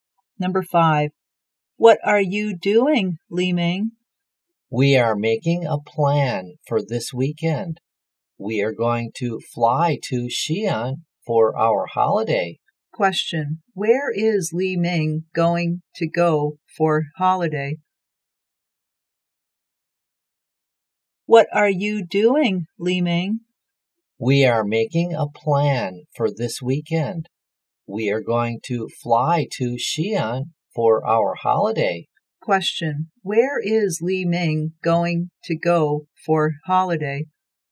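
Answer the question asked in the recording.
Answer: Xi'an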